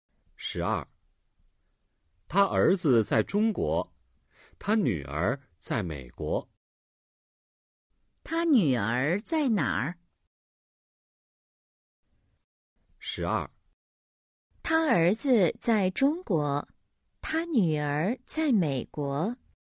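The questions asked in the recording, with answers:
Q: 他女儿在哪儿?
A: 在美国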